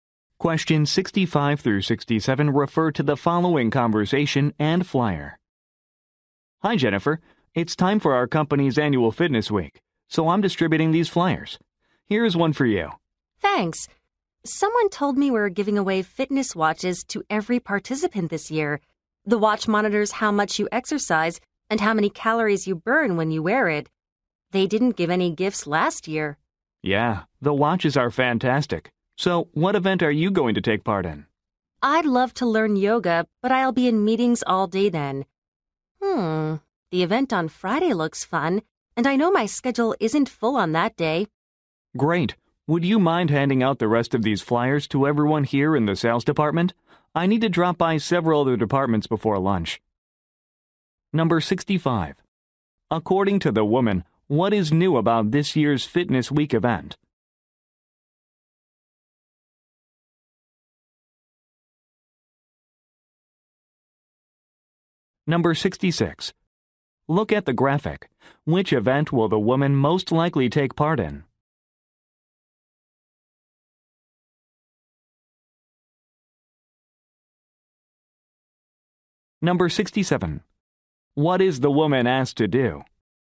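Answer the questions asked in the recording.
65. Participants get free fitness watches
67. Hand out flyers in the sales department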